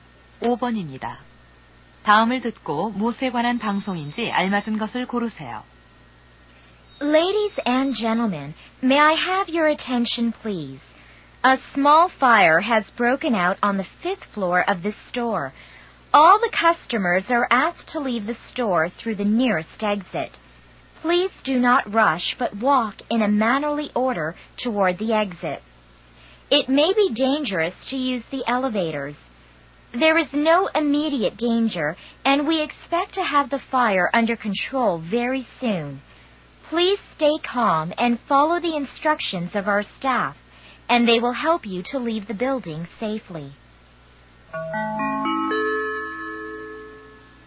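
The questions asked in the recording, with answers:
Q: 다음을 듣고 무엇에 관한 방송인지 알맞은 것을 고르세요.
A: 화재로 인한 대피 안내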